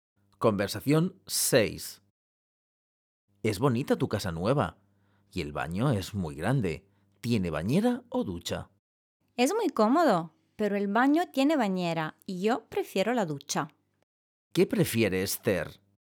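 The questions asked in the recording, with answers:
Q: ¿Qué prefiere Esther?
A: La ducha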